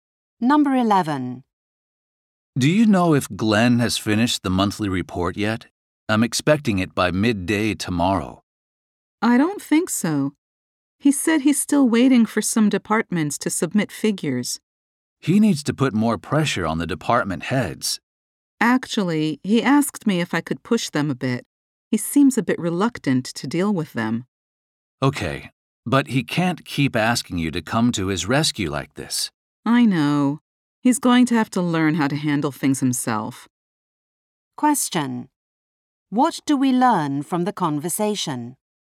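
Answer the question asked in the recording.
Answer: Glenn hasn't finished the report and is reluctant to pressure department heads himself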